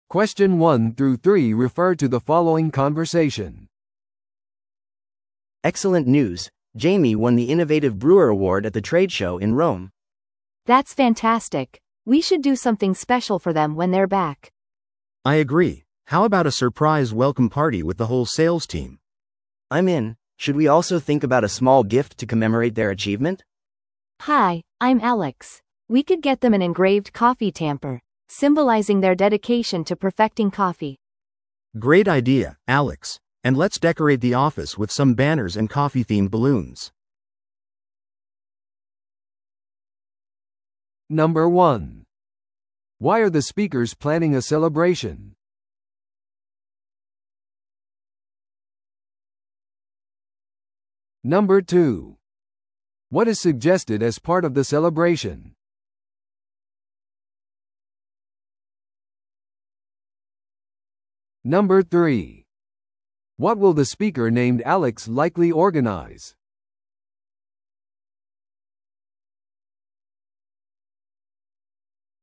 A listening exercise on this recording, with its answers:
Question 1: Why are the speakers planning a celebration?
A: 同僚が賞を受賞したから。

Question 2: What is suggested as part of the celebration?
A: サプライズのおかえりパーティー

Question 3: What will the speaker named Alex likely organize?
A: 記念のギフト

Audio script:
A: Excellent news! Jamie won the Innovative Brewer Award at the trade show in Rome!
B: That's fantastic! We should do something special for them when they're back.
C: I agree. How about a surprise welcome party with the whole sales team?
A: I'm in! Should we also think about a small gift to commemorate their achievement?
B: Hi, I'm Alex. We could get them an engraved coffee tamper, symbolizing their dedication to perfecting coffee.
C: Great idea, Alex. And let's decorate the office with some banners and coffee-themed balloons!